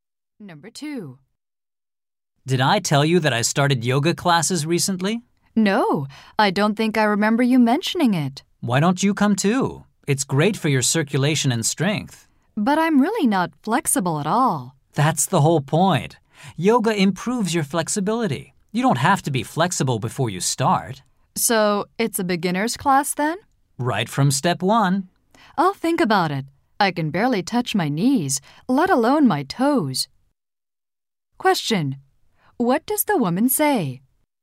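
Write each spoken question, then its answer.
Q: What does the woman say?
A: Yoga improves flexibility; you don't need to be flexible to start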